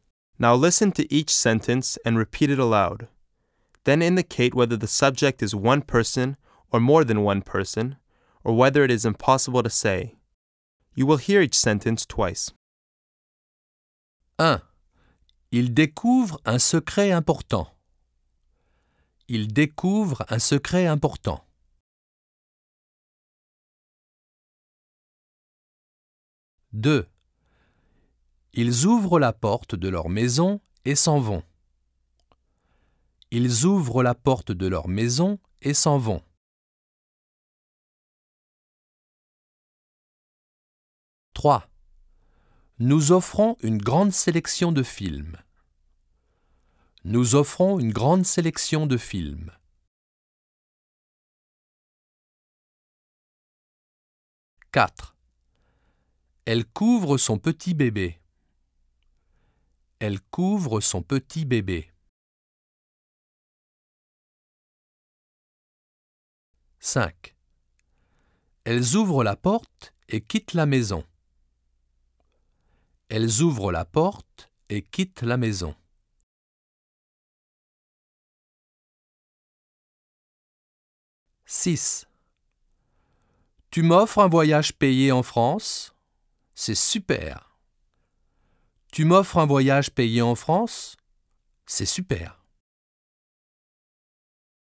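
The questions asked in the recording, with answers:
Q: Ils ouvrent la porte de leur maison et s'en vont.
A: more than one person

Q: Nous offrons une grande sélection de films.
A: more than one person

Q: Elles ouvrent la porte et quittent la maison.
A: more than one person

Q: Tu m'offres un voyage payé en France?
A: one person

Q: Elle ouvre une fenêtre parce qu'il fait chaud.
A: one person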